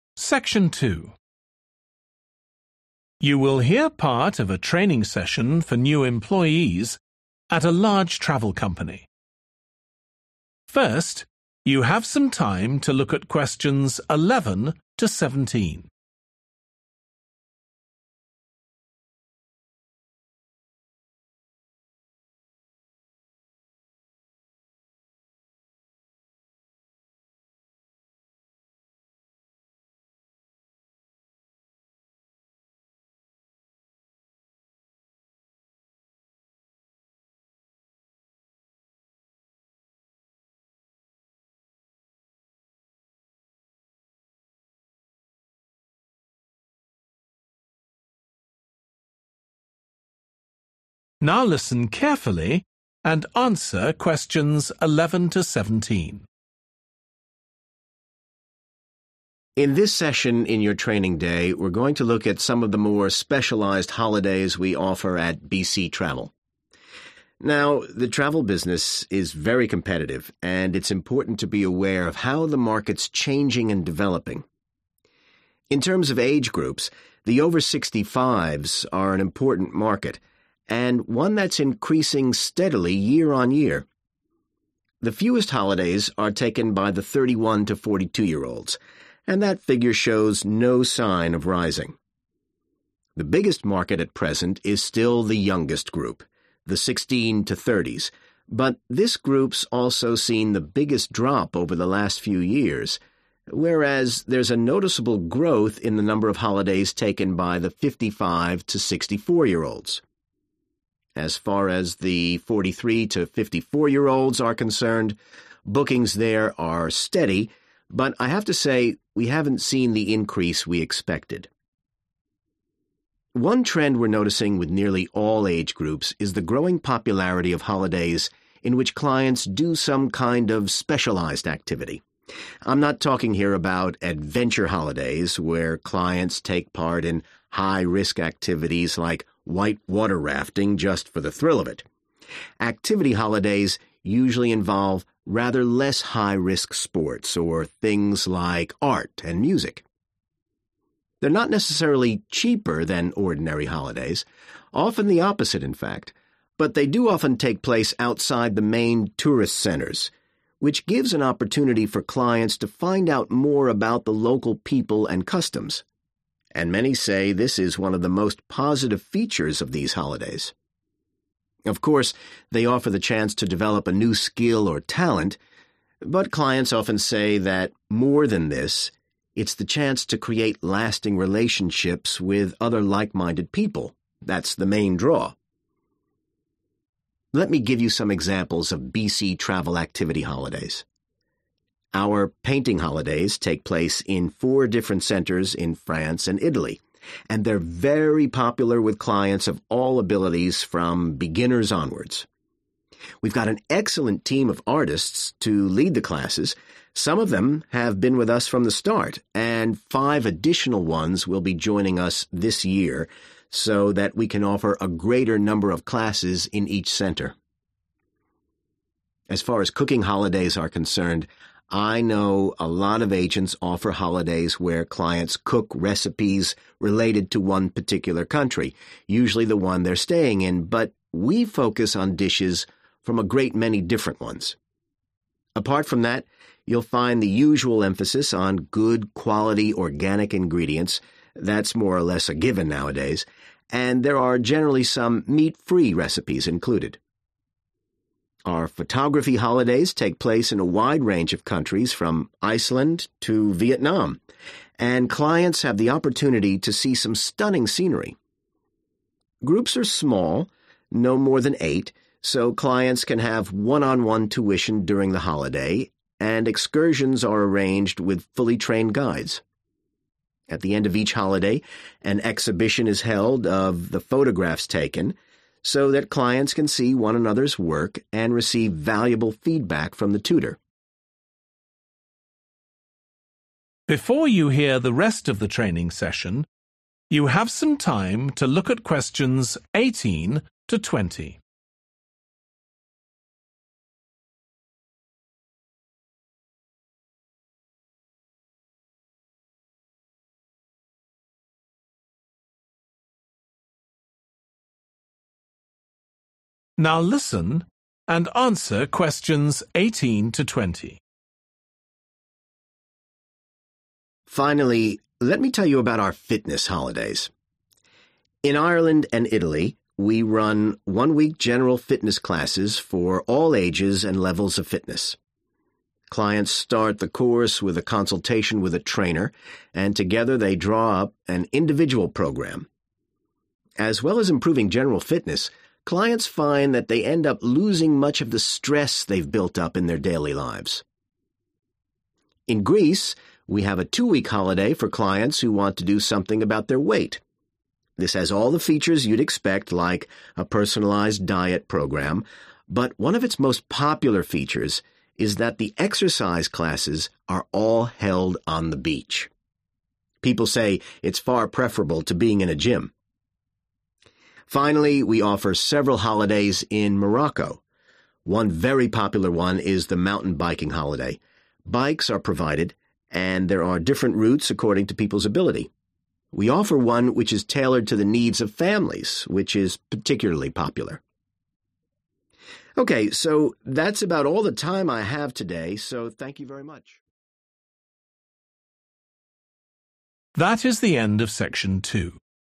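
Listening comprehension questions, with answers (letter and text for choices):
Choose TWO letters, A-E. Which TWO age groups are taking increasing numbers of holidays with BC Travel?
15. How does BC Travel plan to expand the painting holidays?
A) by adding to the number of locations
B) by increasing the range of levels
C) by employing more teachers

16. Why are BC Travel's cooking holidays unusual?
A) They only use organic foods.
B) They have an international focus.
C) They mainly involve vegetarian dishes.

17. What does the speaker say about the photography holidays?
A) Clients receive individual tuition.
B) The tutors are also trained guides.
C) Advice is given on selling photographs.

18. also reduces 18 ..............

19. 19 .............. control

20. one holiday that is specially designed for 20 ..............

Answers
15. C) by employing more teachers
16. B) They have an international focus.
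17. A) Clients receive individual tuition.
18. stress
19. weight
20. families

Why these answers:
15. We've got an excellent team of artists to lead the classes – some of them have been with us from the start, and five additional ones will be joining us this year (Chúng tôi đã có một đội ngũ nghệ sĩ xuất sắc để dẫn dắt các lớp học – một số trong số họ đã theo học với chúng tôi ngay từ đầu và năm người nữa sẽ tham gia cùng chúng tôi trong năm nay)
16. As far as cooking holidays are concerned, I know a lot of agents offer holidays where clients cook recipes related to one particular country, usually the one they're staying in, but we focus on dishes from a great many different ones (Nói về các ngày lễ nấu ăn, thì tôi biết nhiều nơi có tổ chức cho khách hàng tham gia nhưng chỉ nấu những món ăn liên quan đến 1 quốc gia cụ thể. Tuy nhiên, chúng tôi lại tập trung vào những món ăn đến từ nhiều quốc gia khác nhau.)
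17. Groups are small, no more than eight, so clients can have one-on-one tuition during the holiday (Các nhóm nhỏ, không quá tám người, vì vậy khách hàng có thể có học một kèm một trong suốt kỳ nghỉ)
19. In Greece, we have a two-week holiday for clients who want to do something about (=control) their weight. (Ở Hy Lạp, chúng tôi cung cấp một kỳ nghỉ kéo dài hai tuần dành cho khách hàng muốn cải thiện cân nặng của mình.)
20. We offer one which is tailored (=designed for) to the needs of families (Chúng tôi cung cấp một loại (kỳ nghỉ) phù hợp với nhu cầu của các gia đình)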